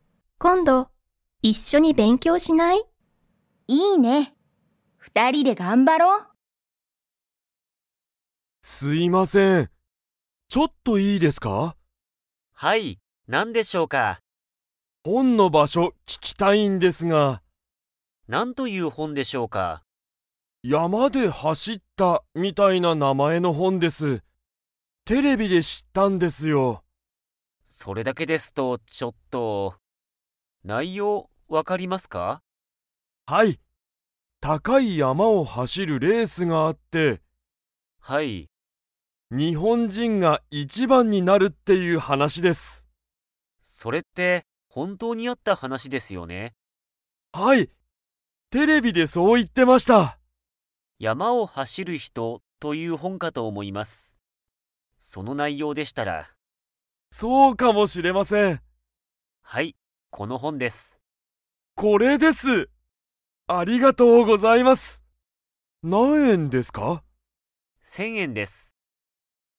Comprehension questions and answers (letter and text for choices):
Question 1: 佐藤(さとう)さんは、本(ほん)の場所(ばしょ))がわかりますか?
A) はい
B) いいえ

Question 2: 佐藤(さとう)さんはその本(ほん)を、____で知(し)った。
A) テレビ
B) 山(やま)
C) 日本人(にほんじん)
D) 本(ほん)))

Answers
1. B) いいえ
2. A) テレビ

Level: Level 2